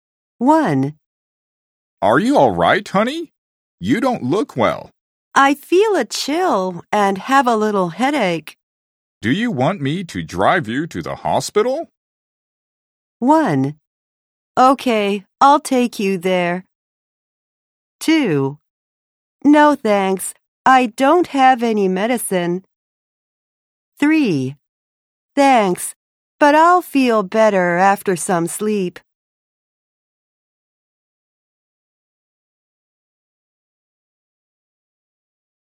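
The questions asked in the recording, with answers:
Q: Do you want me to drive you to the hospital?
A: 3: Thanks, but I'll feel better after some sleep.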